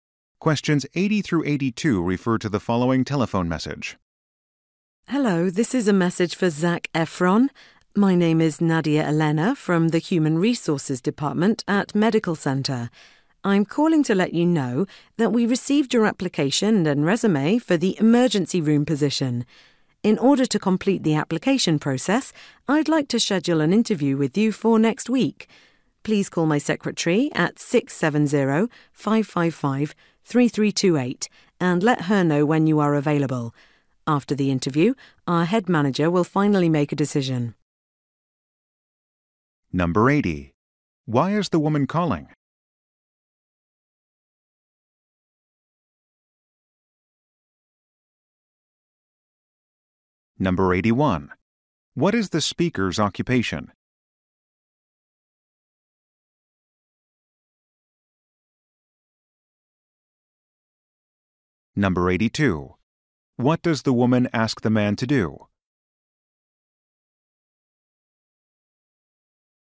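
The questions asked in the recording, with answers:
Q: Why is the woman calling?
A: To schedule a job interview

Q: What does the woman ask the man to do?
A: Call her secretary with his availability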